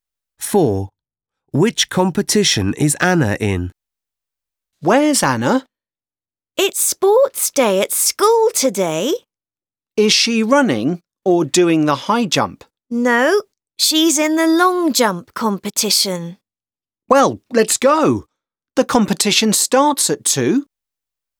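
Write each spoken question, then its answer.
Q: Which competition is Anna in?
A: the long jump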